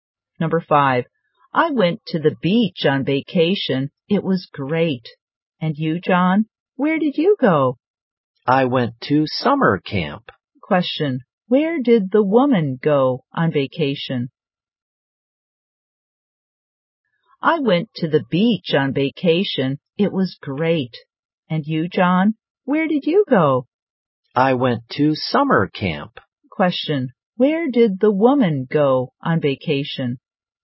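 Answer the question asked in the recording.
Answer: To the beach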